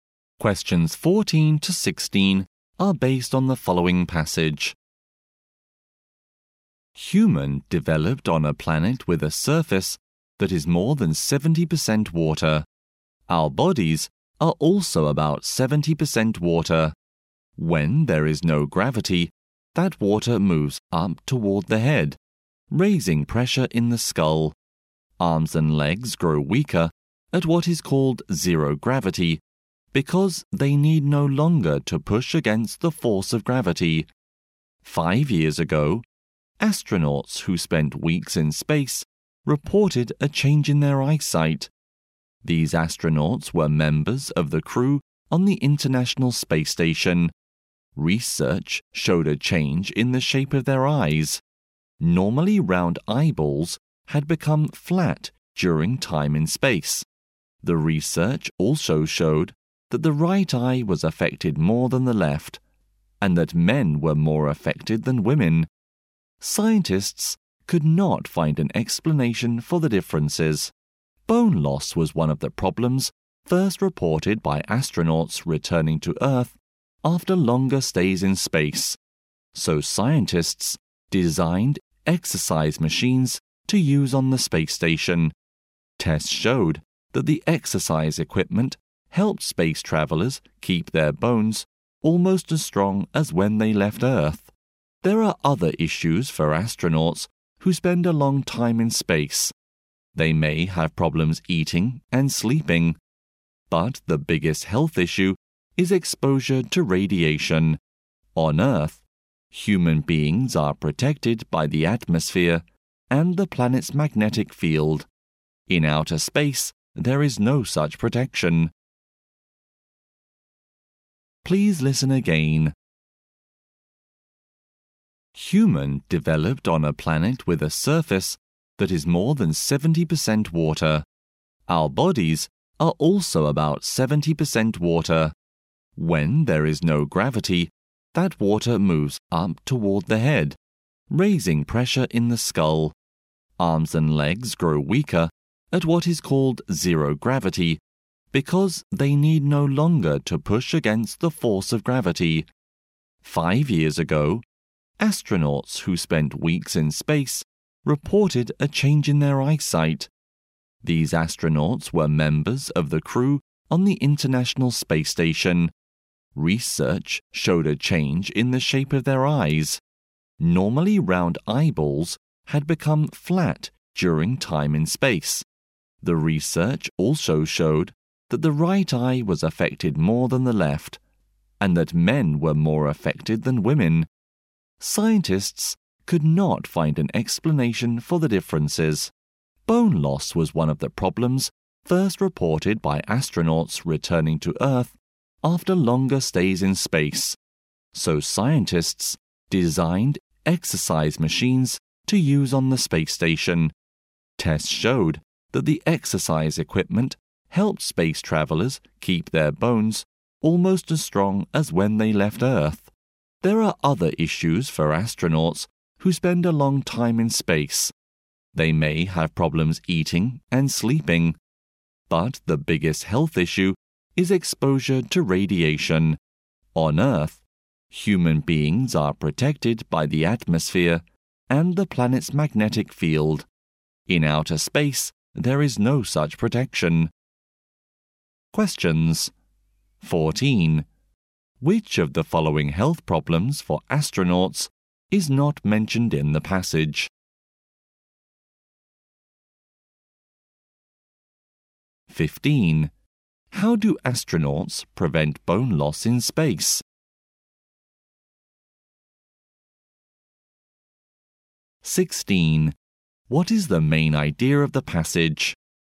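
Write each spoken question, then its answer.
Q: How do astronauts prevent bone loss in space?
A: By using exercise machines

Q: What is the main idea of the passage?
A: Health problems of astronauts in space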